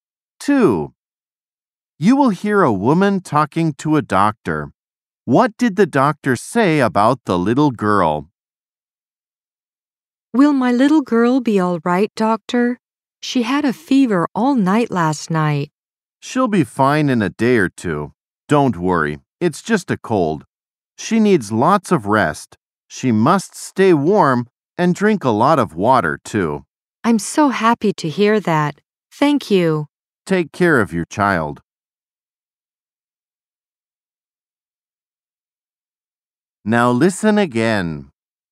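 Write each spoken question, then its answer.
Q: What did the doctor say about the little girl?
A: She has just a cold and will be fine in a day or two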